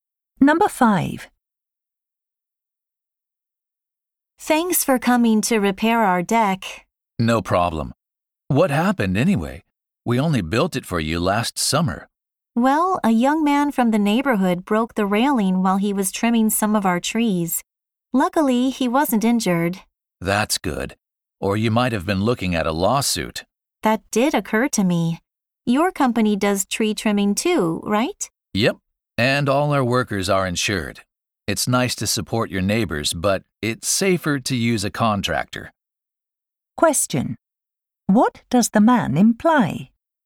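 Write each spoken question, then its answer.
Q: What does the man imply?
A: They should hire an insured contractor for tree trimming instead of a neighbor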